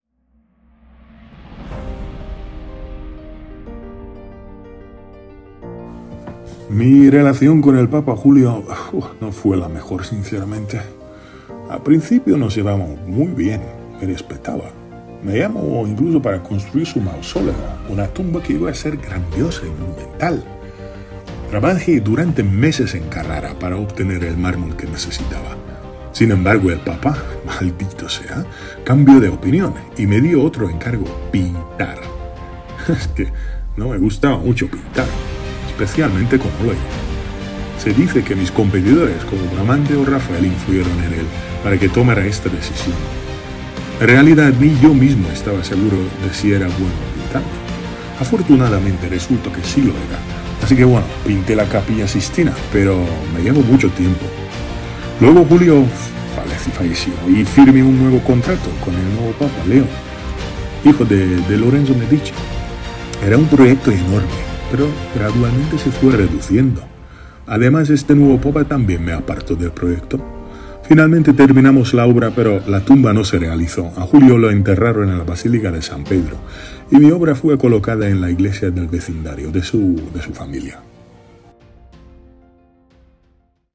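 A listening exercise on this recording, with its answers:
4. ¿Cuál Papa tiene su tumba en la basílica?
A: Julio II

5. ¿Quién diseñó la tumba del famoso Papa en la basílica?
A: Miguel Ángel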